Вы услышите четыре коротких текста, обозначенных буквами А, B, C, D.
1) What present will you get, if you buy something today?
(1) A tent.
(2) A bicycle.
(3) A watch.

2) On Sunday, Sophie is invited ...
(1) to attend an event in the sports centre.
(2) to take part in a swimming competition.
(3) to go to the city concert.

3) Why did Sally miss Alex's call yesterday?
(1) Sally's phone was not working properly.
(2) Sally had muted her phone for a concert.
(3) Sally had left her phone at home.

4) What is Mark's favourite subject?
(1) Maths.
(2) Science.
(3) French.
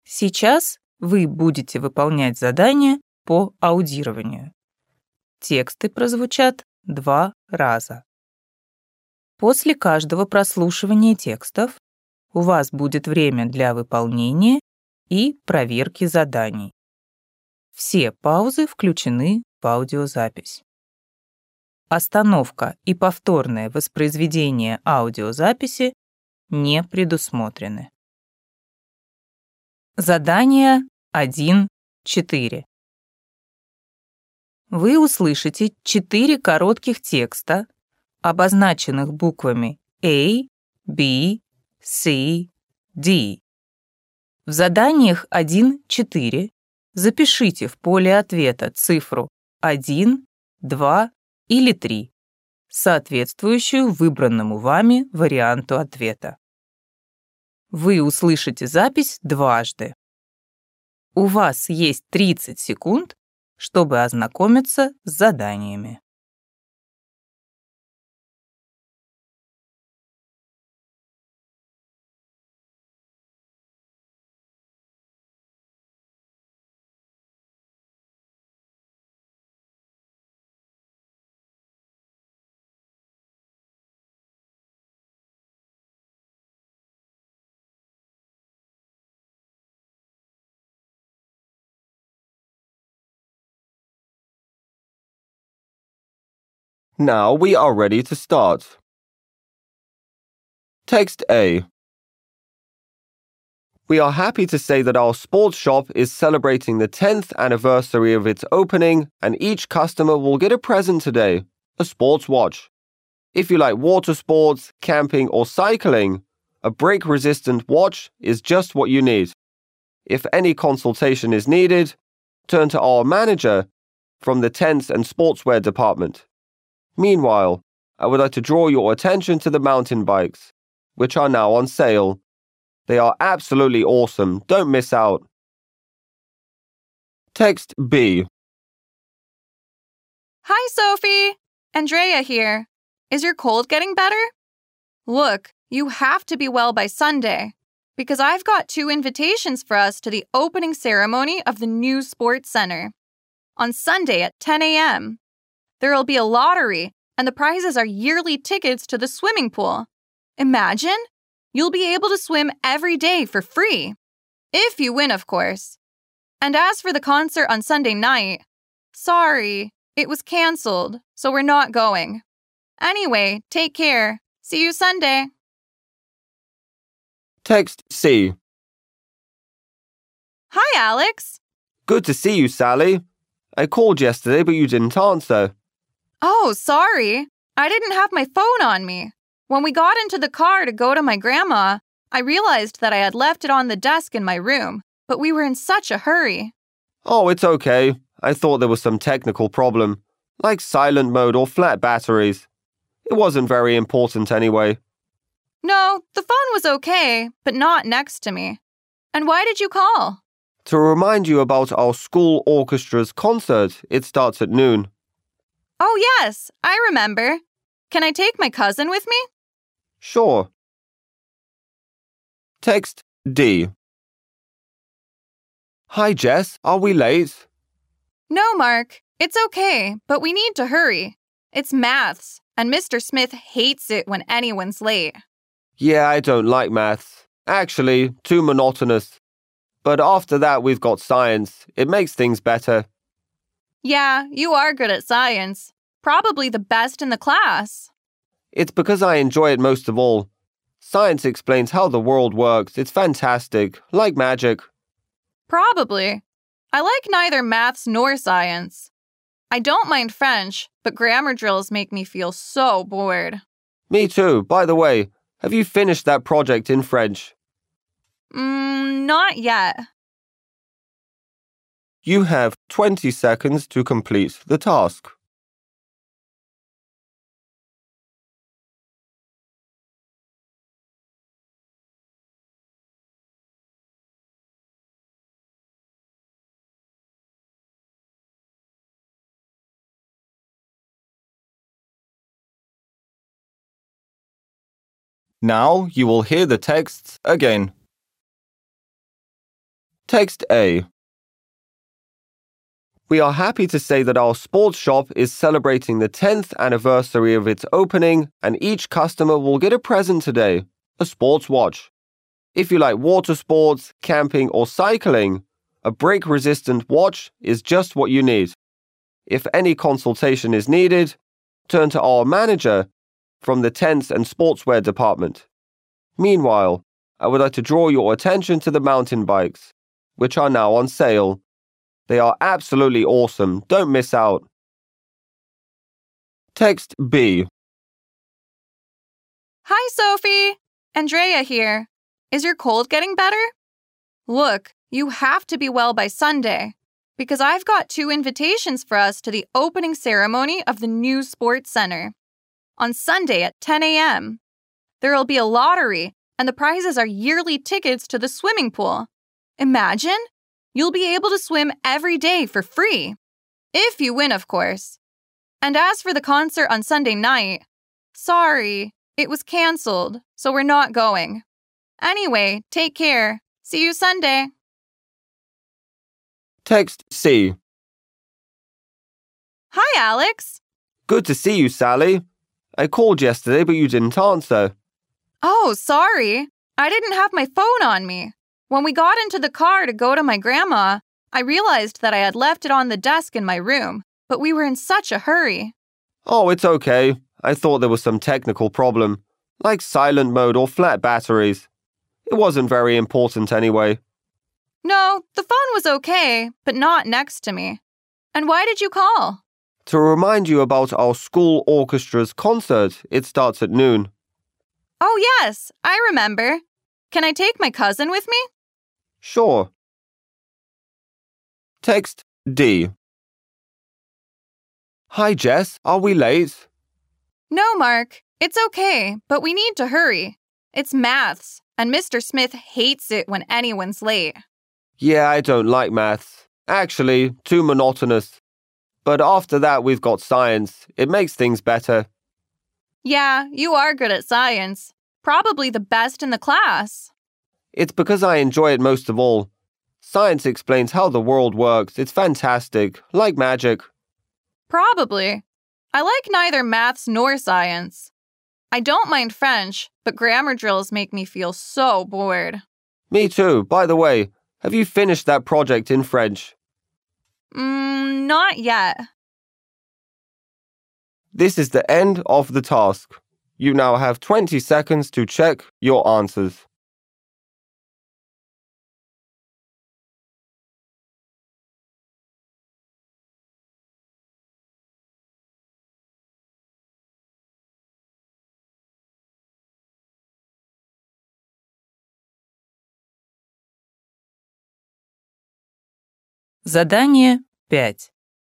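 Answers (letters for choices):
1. 3
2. 1
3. 3
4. 2

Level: ОГЭ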